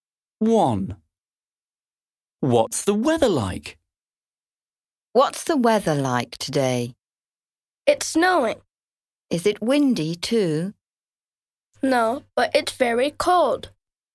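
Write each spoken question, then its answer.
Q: What's the weather like?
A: It's snowing and very cold.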